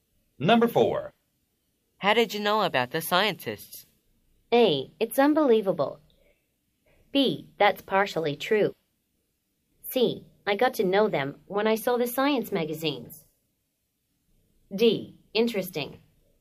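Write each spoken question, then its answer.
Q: How did you know about the scientists?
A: C: I got to know them when I saw the science magazines.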